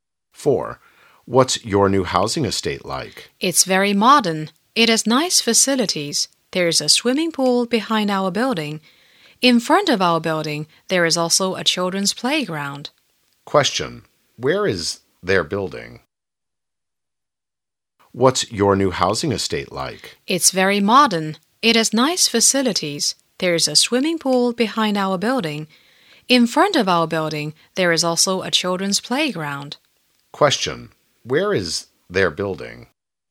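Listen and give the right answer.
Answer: Between the swimming pool and the children's playground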